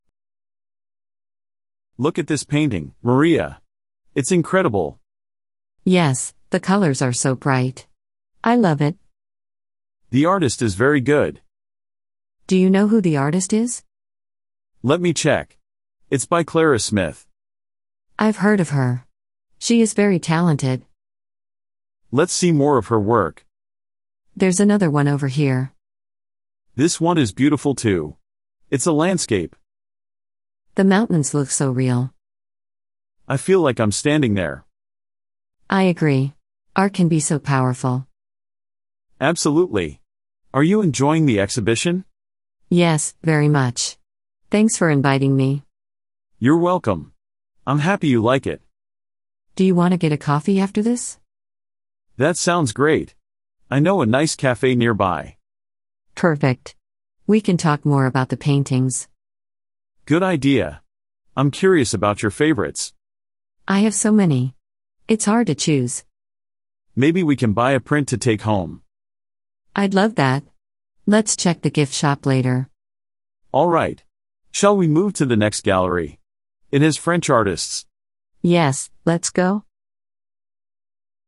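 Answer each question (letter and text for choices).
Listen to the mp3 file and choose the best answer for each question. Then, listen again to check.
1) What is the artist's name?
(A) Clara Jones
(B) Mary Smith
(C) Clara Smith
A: (C) Clara Smith

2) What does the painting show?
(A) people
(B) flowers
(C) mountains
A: (C) mountains

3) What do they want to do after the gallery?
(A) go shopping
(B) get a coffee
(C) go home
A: (B) get a coffee

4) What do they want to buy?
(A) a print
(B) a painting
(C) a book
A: (A) a print

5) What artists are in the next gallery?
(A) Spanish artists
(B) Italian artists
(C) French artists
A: (C) French artists

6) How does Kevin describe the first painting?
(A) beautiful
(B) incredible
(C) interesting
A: (B) incredible

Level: Beginner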